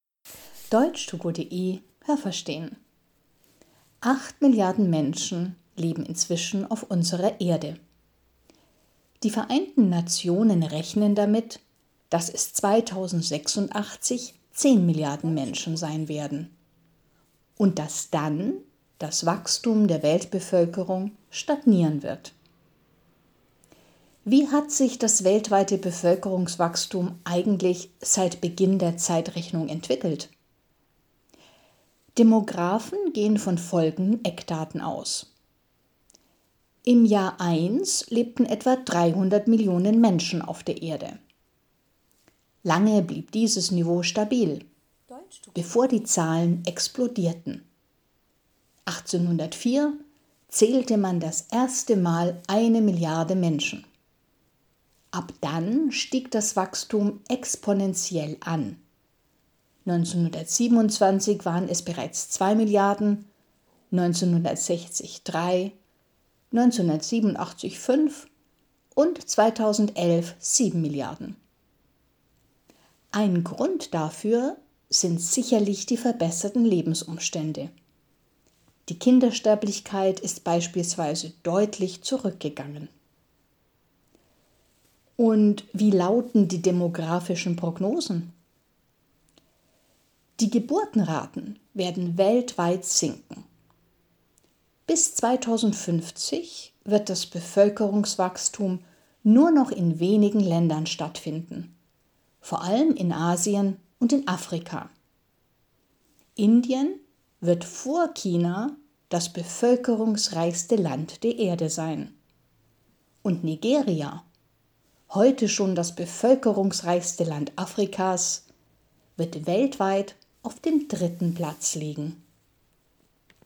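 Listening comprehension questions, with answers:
Welche Präposition passt?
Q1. _____ der Erde leben acht Milliarden Menschen.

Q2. Wie hat sich das Bevölkerungswachstum _____ Beginn der Zeitrechnung entwickelt?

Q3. 2050 wird Indien _____ China das bevölkerungsreichste Land der Erde sein.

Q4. Das Bevölkerungswachstum findet _____ allem in Asien und in Afrika statt.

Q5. 2050 wird Nigeria _____ dem dritten Platz liegen.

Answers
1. Auf
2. seit
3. vor
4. vor
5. auf

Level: B1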